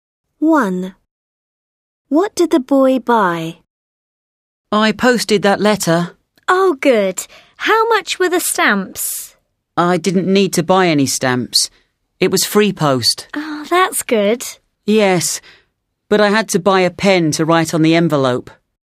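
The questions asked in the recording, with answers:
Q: What did the boy buy?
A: A pen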